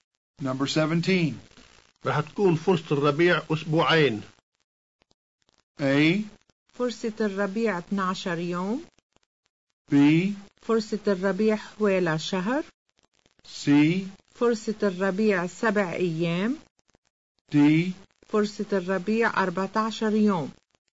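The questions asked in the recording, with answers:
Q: رح تكون فرصة الربيع أسبوعين.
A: D: فرصة الربيع 14 يوم.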